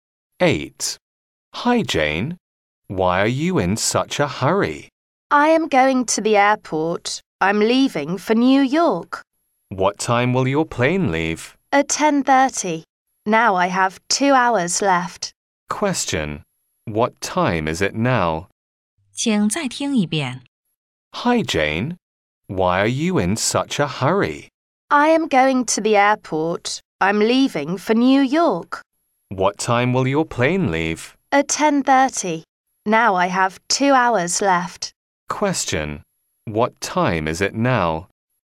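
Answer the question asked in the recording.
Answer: 8:30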